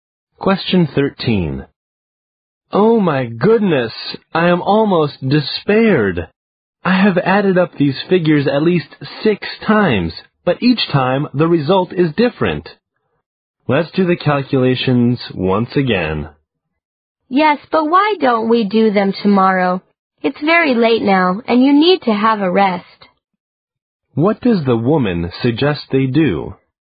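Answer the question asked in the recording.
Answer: Do the calculations tomorrow and rest now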